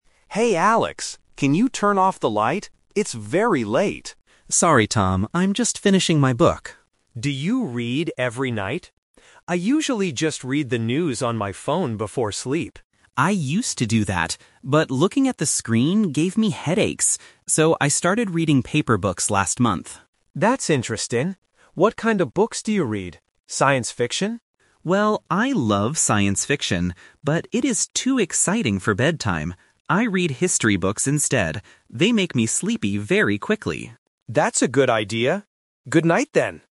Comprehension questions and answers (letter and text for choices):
Listen to the conversation between two roommates. Choose the correct answer (A, B, or C) for each question.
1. What does Tom usually do before sleep?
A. He reads paper books.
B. He reads the news on his phone.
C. He listens to the radio.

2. Why did Alex stop looking at his phone at night?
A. Because it gave him headaches.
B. Because his phone was broken.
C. Because the news was boring.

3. What kind of book does Alex read at bedtime?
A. Science fiction.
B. Comic books.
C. History books.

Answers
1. B. He reads the news on his phone.
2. A. Because it gave him headaches.
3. C. History books.

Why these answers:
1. Tom explicitly says his own habit: "I usually just read the news on my phone before sleep."
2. Alex explains why he changed his habit: "But looking at the screen gave me headaches."
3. Alex states his final choice: "I read history books instead."

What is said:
Tom: Hey Alex, can you turn off the light? It's very late.
Alex: Sorry, Tom. I'm just finishing my book.
Tom: Do you read every night? I usually just read the news on my phone before sleep.
Alex: I used to do that. But looking at the screen gave me headaches. So, I started reading paper books last month.
Tom: That's interesting. What kind of books do you read? Science fiction?
Alex: Well, I love science fiction, but it is too exciting for bedtime. I read history books instead.